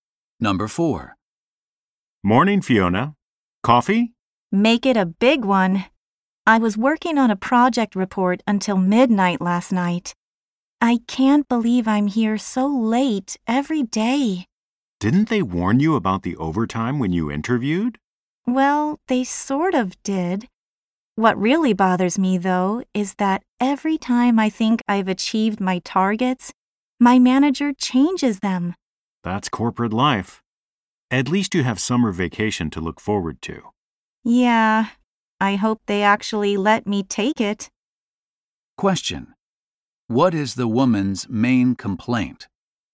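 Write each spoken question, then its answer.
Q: What is the woman's main complaint?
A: Her manager keeps changing her targets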